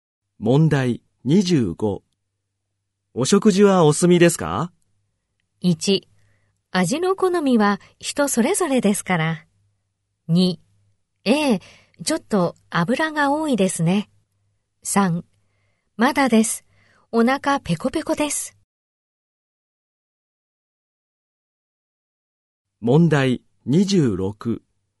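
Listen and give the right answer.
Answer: 3: まだです。お腹ペコペコです。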